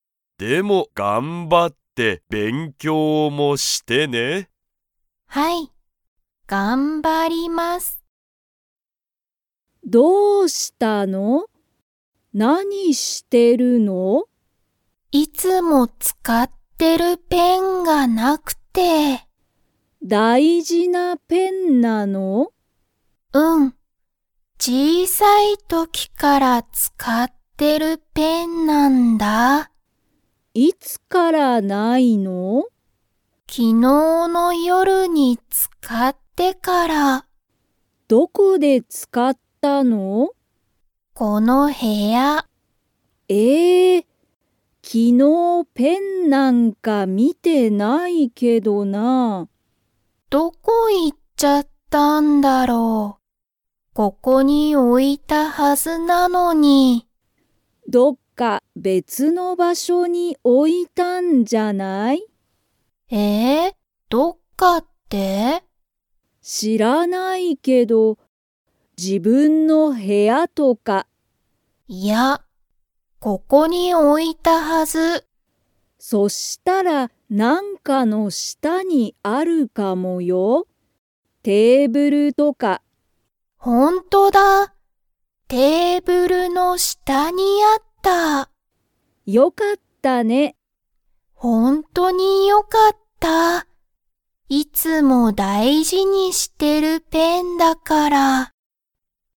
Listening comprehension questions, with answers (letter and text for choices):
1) そのペンは、____。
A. 小(ちい)さい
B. 大事(だいじ)だ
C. 別(べつ)のだ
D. 楽(たの)しい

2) えみのペンは、自分(じぶん)の部屋(へや)にありましたか?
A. はい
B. いいえ)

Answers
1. B. 大事(だいじ)だ
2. B. いいえ)

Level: Level 2